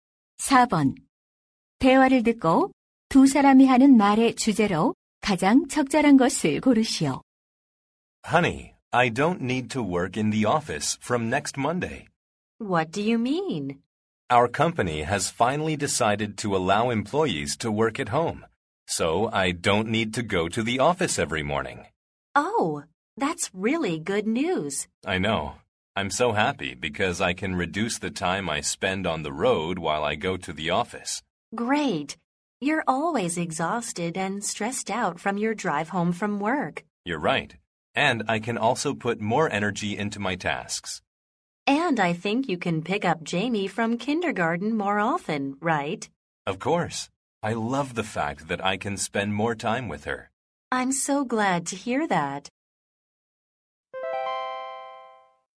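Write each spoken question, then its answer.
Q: 대화를 듣고 두 사람이 하는 말의 주제로 가장 적절한 것을 고르시오.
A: 재택근무의 장점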